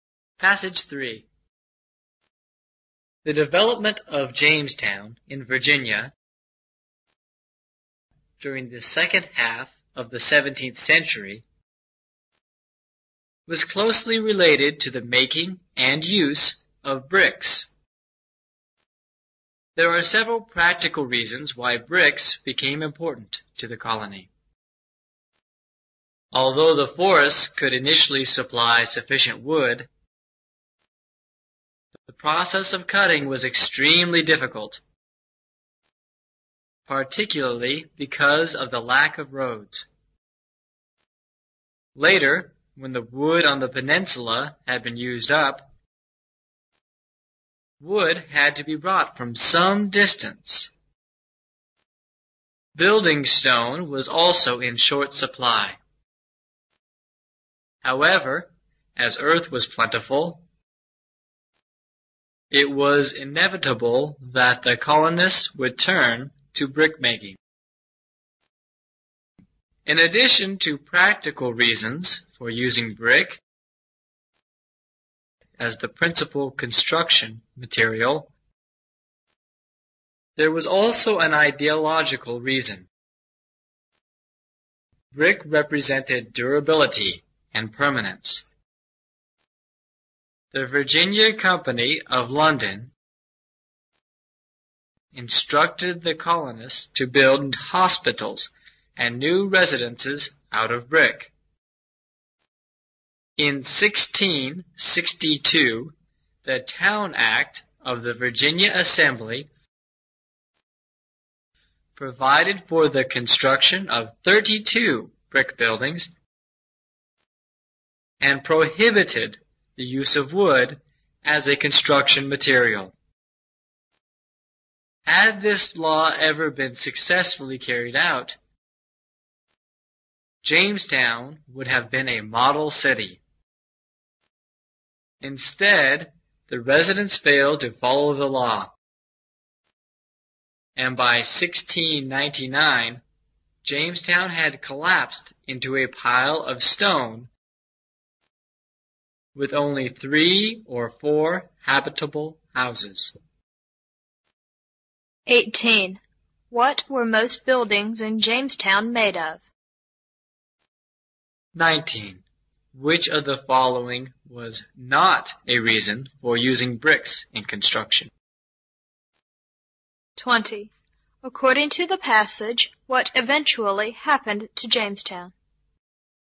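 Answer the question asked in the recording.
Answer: By 1699 it had collapsed into a pile of stone with only 3 or 4 habitable houses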